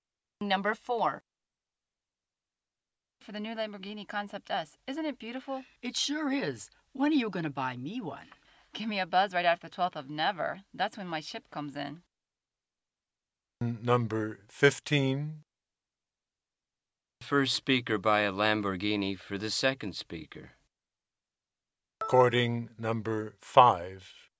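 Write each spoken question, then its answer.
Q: The first speaker buy a Lamborghini for the second speaker.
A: Never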